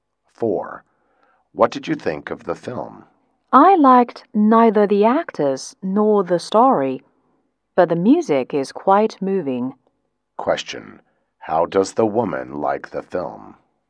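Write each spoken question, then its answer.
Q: how does the woman like the film?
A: She only liked the music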